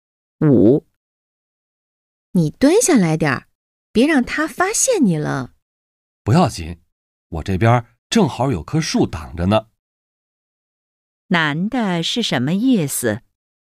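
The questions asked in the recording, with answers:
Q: 男的是什么意思?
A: 有树挡着,不会被发现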